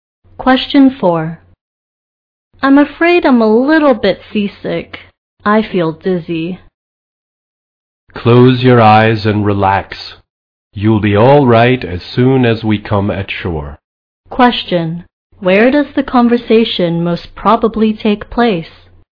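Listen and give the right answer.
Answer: On a boat.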